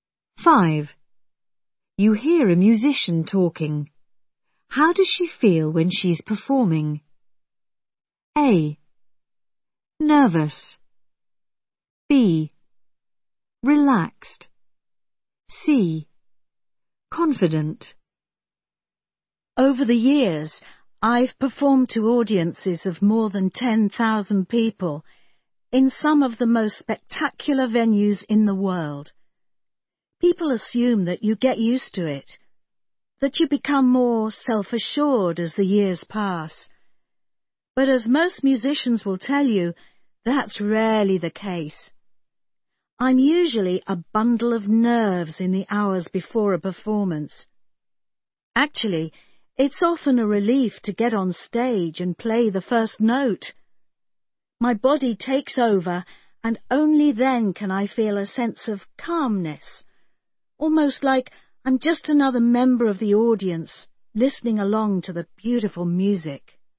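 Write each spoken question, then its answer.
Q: How does she feel when she's performing?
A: B: Relaxed.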